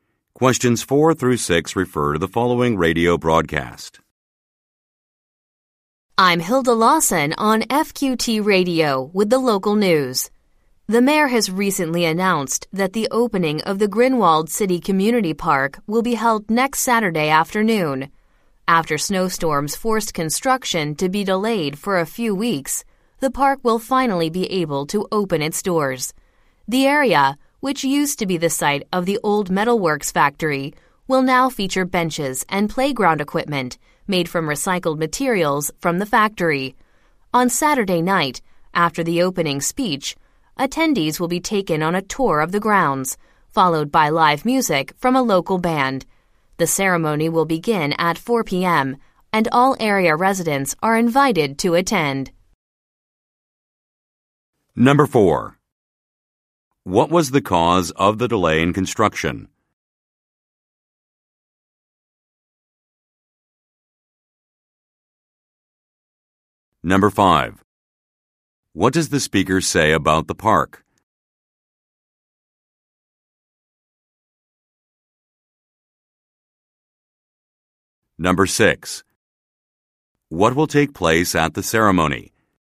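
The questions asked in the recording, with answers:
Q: What was the cause of the delay in construction?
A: Snowstorms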